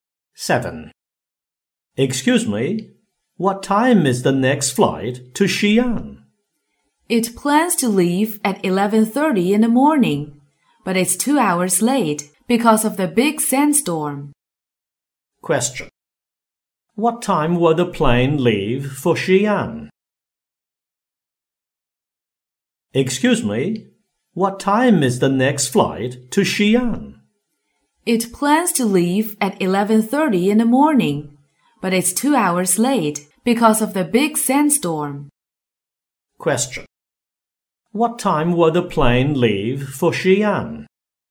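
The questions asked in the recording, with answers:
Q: What time will the plane leave for Xi'an?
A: At 1:30 in the afternoon.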